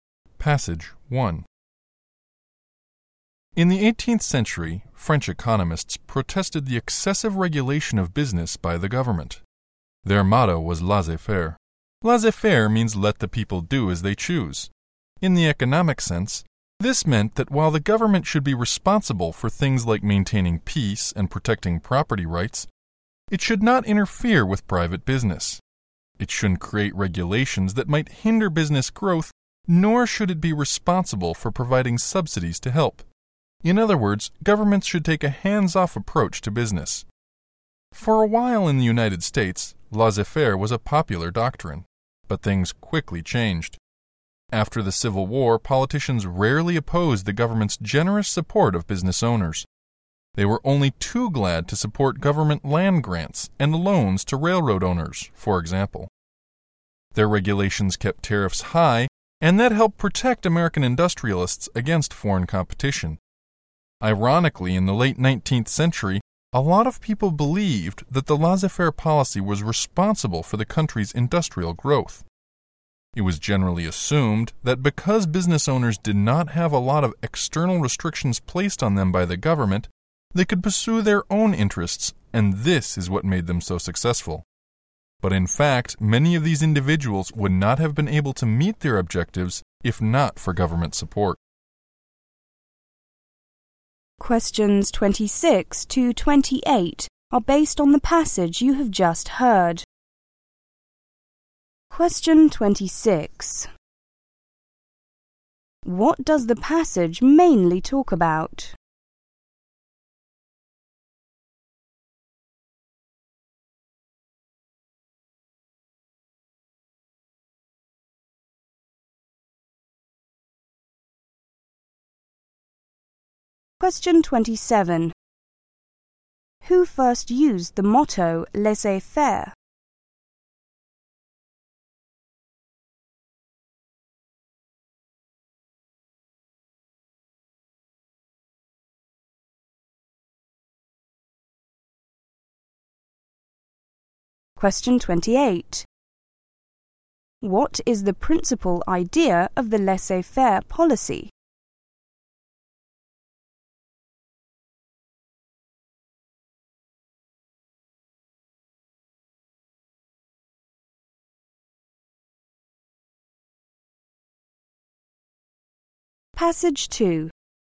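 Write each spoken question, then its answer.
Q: What does the passage mainly talk about?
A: The laissez-faire policy and government support of business

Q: Who first used the motto laissez-faire?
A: 18th-century French economists

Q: What is the principal idea of the laissez-faire policy?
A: The government should not interfere with private business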